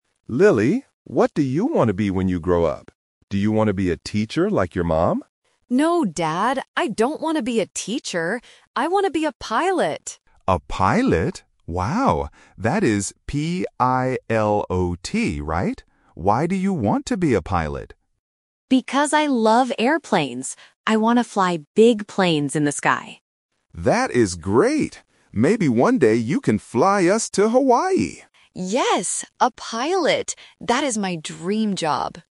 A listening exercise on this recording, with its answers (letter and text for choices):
Listen to the conversation between a father and his daughter. Choose the correct answer (A, B, or C) for each question.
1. What does Lily want to be when she grows up?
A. A teacher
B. A pilot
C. A doctor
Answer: B. A pilot

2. What is Lily's mother's job?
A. A teacher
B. A pilot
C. A nurse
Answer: A. A teacher

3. What does Lily love?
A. Hawaii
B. Cars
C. Airplanes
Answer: C. Airplanes

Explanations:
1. Lily clearly says "I want to be a pilot!". Option (A) is the trap because "teacher" is mentioned, but she explicitly rejects it ("I don't want to be a teacher"). Option (C) is not mentioned in the audio.
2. The dad asks: "Do you want to be a teacher like your mom?". This means her mom is a teacher. Option (B) is Lily's dream job, not her mom's. Option (C) is not mentioned.
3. Lily says "Because I love airplanes!". Option (A) is the trap because Hawaii is mentioned by the dad later ("fly us to Hawaii"), but it is not the direct answer to what she loves. Option (B) is not mentioned.

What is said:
Dad: Lily, what do you want to be when you grow up? Do you want to be a teacher like your mom?
Lily: No, Dad. I don't want to be a teacher. I want to be a pilot!
Dad: A pilot? Wow. That is P-I-L-O-T, right? Why do you want to be a pilot?
Lily: Because I love airplanes! I want to fly big planes in the sky.
Dad: That is great! Maybe one day you can fly us to Hawaii.

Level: A1